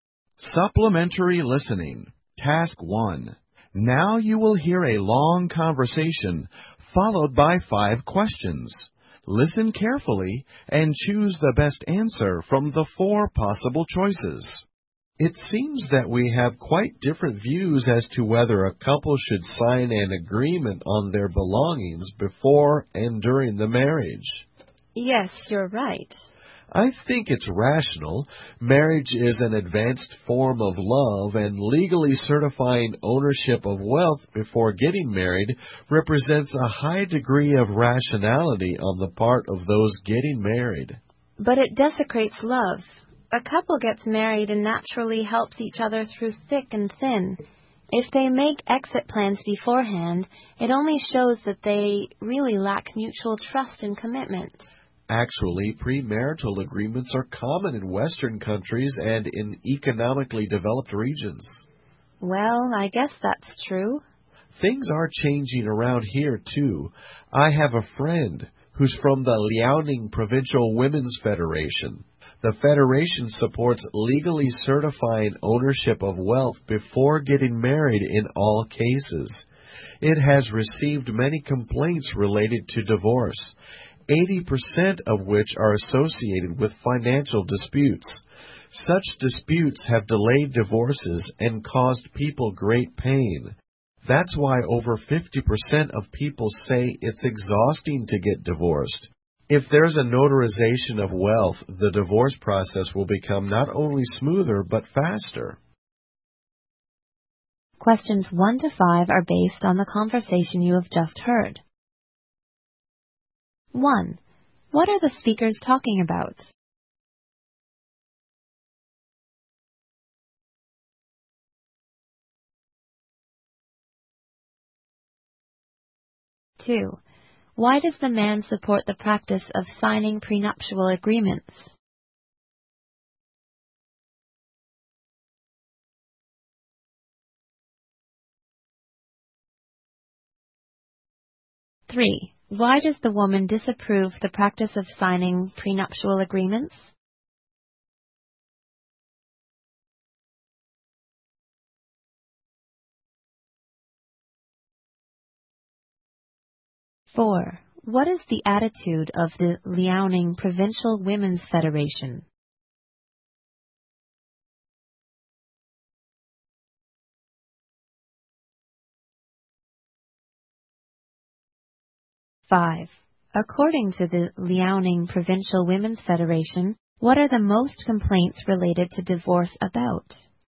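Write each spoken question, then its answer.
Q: What are the speakers talking about?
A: Prenuptial agreements on a couple's belongings

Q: What is the attitude of the Liaoning Provincial Women's Federation?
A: It supports legally certifying ownership of wealth before marriage

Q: According to the Liaoning Provincial Women's Federation, what are the most complaints related to divorce about?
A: Financial disputes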